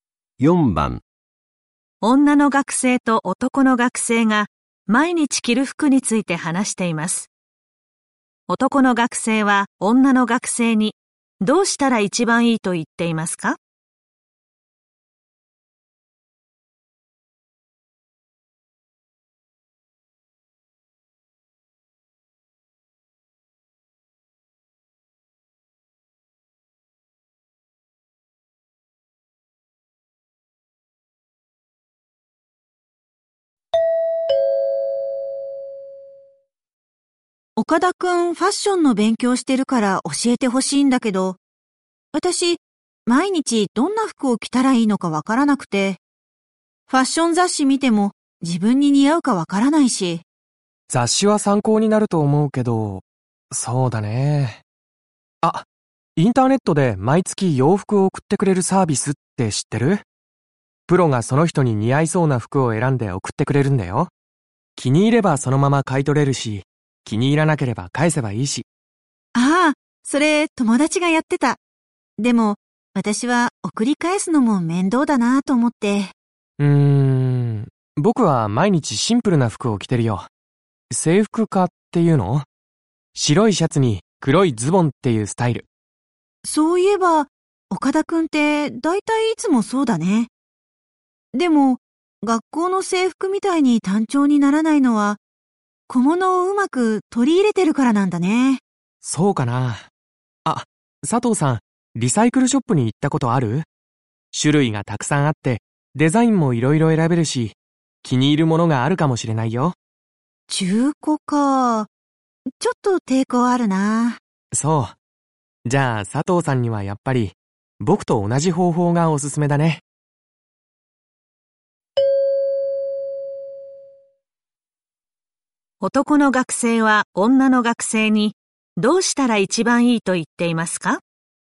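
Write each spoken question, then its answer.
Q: 男の学生は女の学生に、どうしたら一番いいと言っていますか?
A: シンプルな服を毎日着て小物を取り入れる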